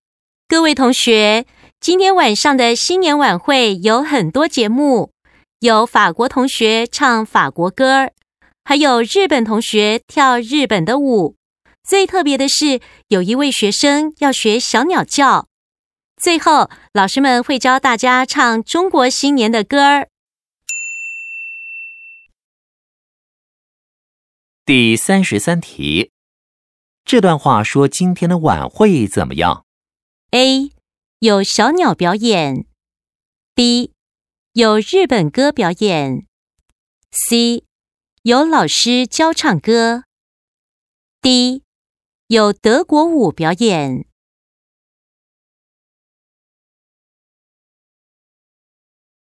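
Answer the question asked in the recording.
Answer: C: 有老师教唱歌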